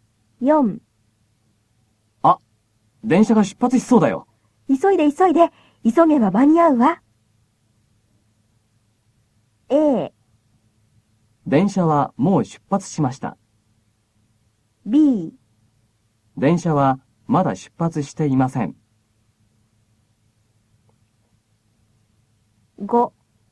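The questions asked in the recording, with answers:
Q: A。電車はもう出発しました。B。電車はまだ出発していません。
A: B: 電車はまだ出発していません。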